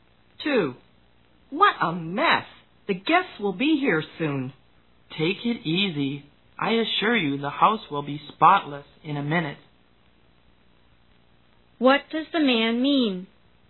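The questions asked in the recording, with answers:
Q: What does the man mean?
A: The house will be cleaned up very quickly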